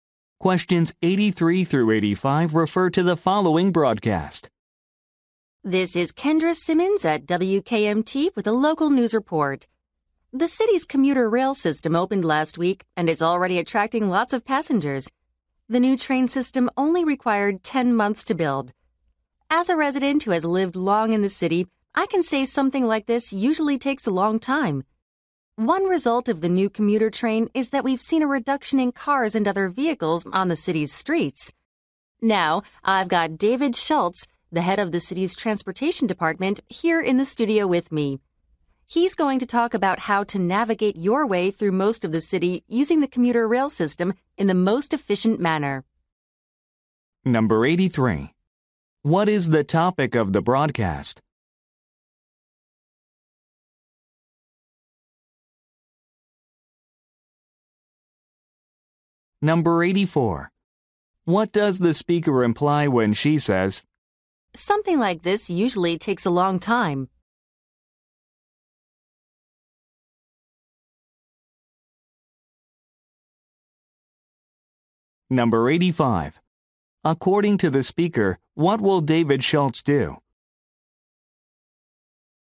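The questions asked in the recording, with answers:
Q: What is the topic of the broadcast?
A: The city's new commuter rail system

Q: What does the speaker imply when she says,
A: The train system was built unusually quickly

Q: According to the speaker, what will David Schultz do?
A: Explain how to get around the city efficiently by commuter rail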